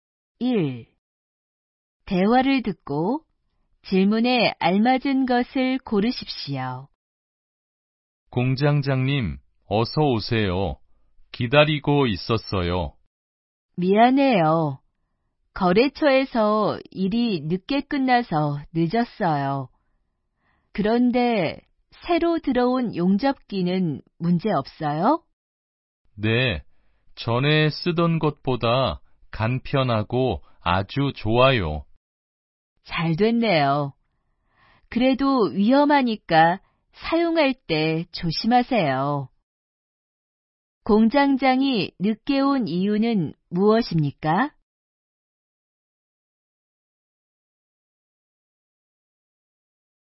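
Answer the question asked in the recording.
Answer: 거래처에서 일이 늦게 끝나서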